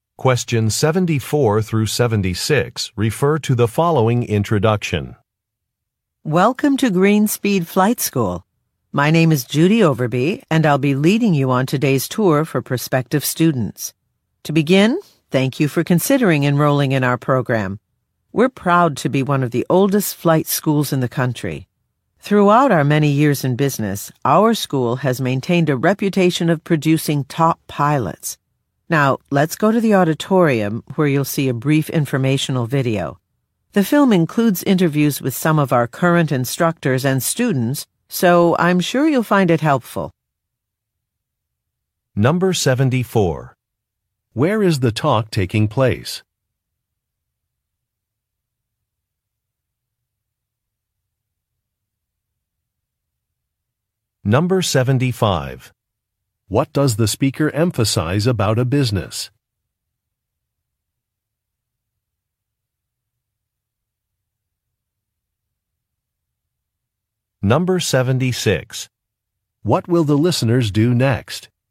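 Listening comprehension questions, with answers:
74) Where is the talk taking place?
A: At a flight school

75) What does the speaker emphasize about a business?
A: It has a long history.

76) What will the listeners do next?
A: Watch a film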